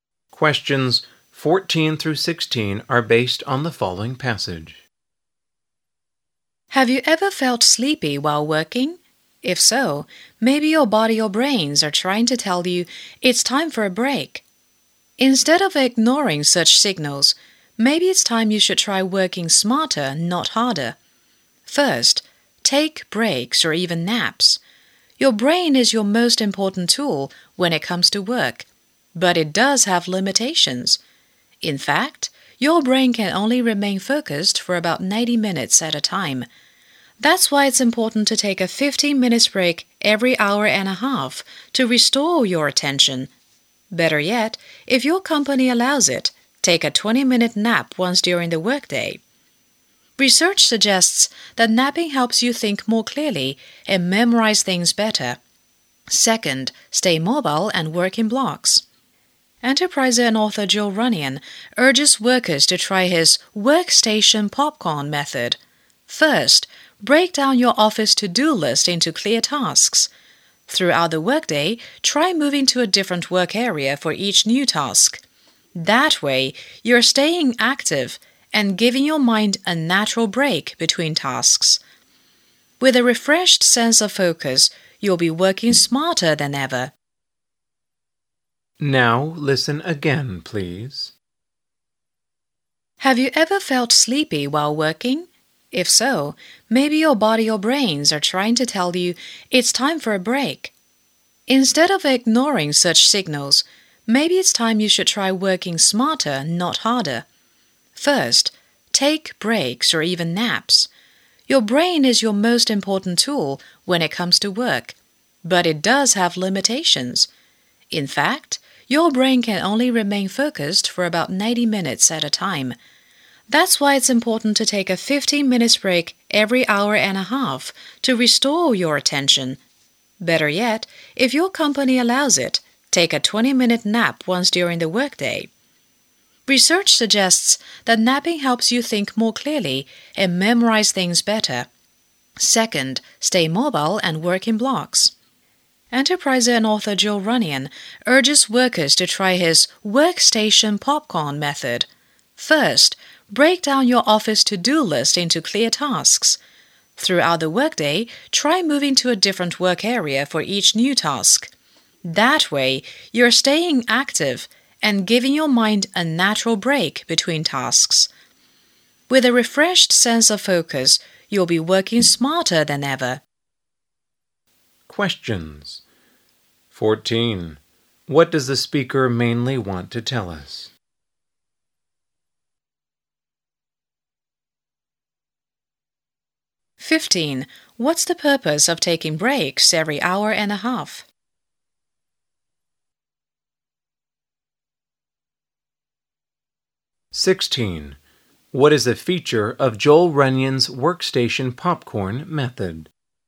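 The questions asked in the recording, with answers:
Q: What does the speaker mainly want to tell us?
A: How to work smarter rather than harder

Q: What's the purpose of taking breaks every hour and a half?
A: To restore your attention

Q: What is a feature of Joel Runyon's workstation popcorn method?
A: Moving to a different work area for each new task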